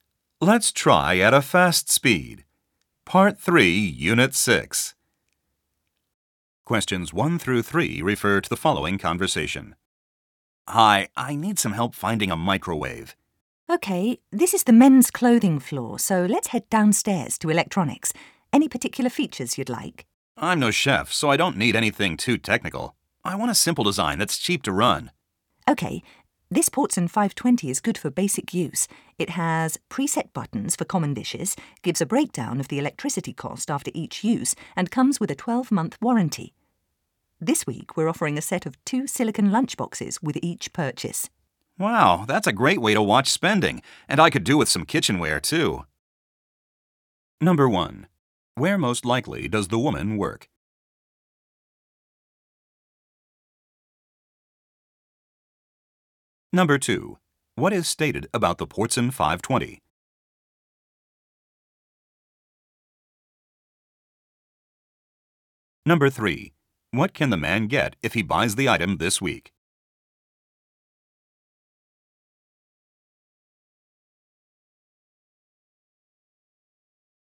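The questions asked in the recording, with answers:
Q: Where most likely does the woman work?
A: At a department store

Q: What can the man get if he buys the item this week?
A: A set of 2 silicone lunchboxes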